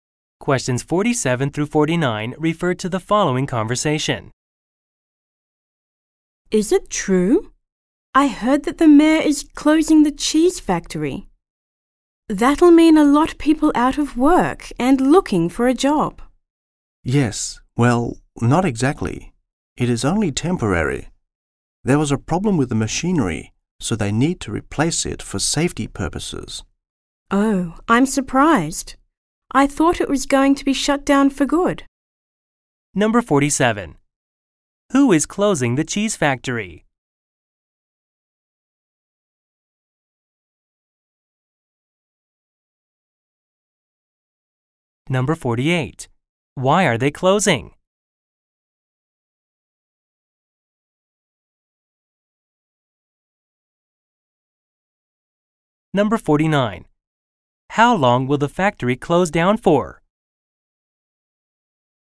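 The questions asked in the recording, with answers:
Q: Who is closing the cheese factory?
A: The mayor

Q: Why are they closing?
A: To replace faulty machinery for safety

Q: How long will the factory close down for?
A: Only temporarily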